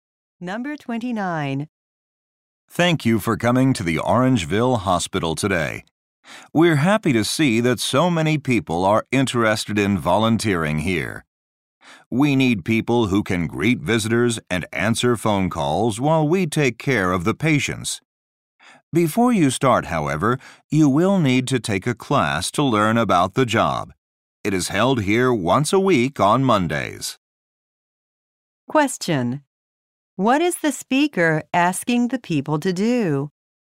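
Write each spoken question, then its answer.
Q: What is the speaker asking the people to do?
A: Take a class to learn about the job.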